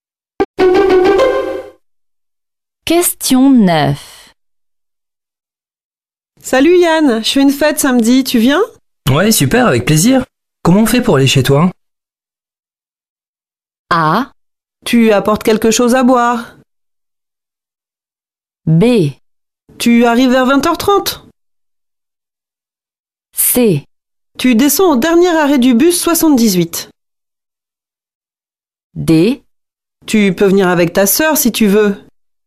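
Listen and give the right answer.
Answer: C: Tu descends au dernier arrêt du bus 78.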